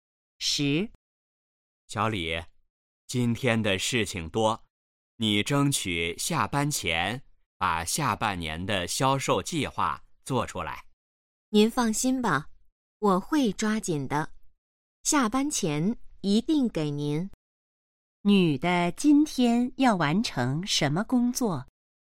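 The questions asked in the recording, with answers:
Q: 女的今天要完成什么工作?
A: 下半年的销售计划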